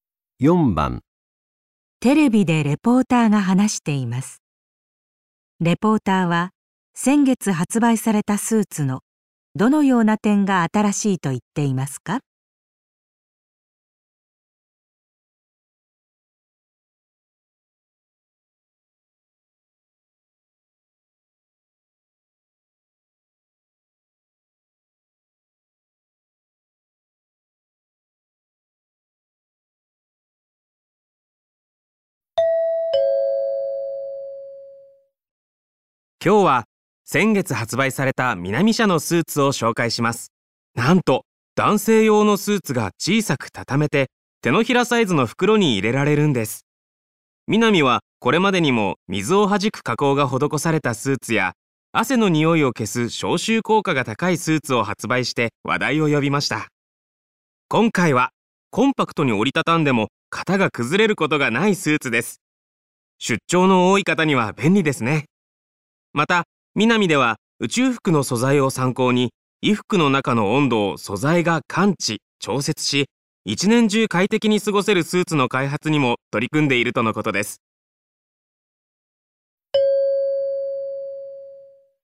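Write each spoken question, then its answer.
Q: レポーターは先月発売されたスーツのどのような点が新しいと言っていますか?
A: 小さく折りたたんでも型が崩れない点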